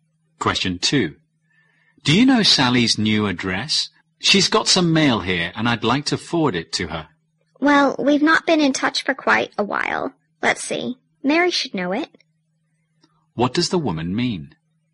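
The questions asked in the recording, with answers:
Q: What does the woman mean?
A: She doesn't know Sally's address; Mary may know it.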